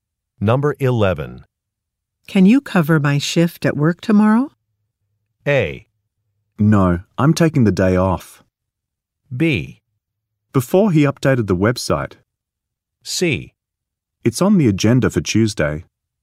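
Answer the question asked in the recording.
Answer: A: No, I'm taking the day off.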